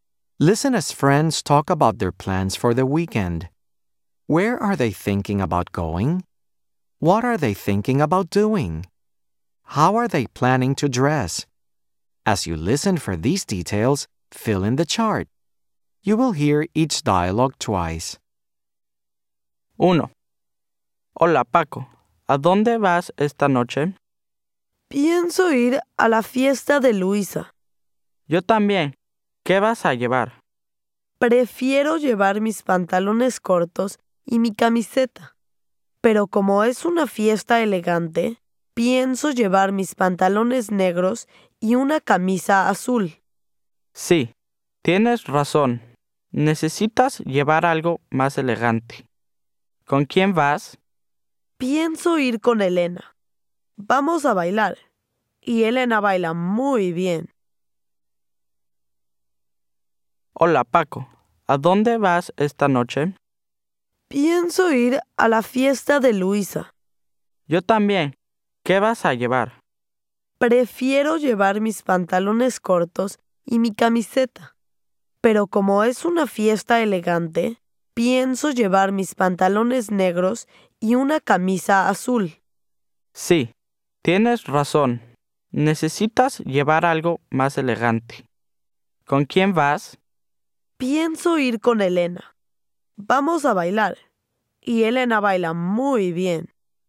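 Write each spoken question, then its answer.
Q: Where are they thinking about going?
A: To Luisa's party

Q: What are they thinking about doing?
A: Dancing (with Elena)

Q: How are they planning to dress?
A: Black pants and a blue shirt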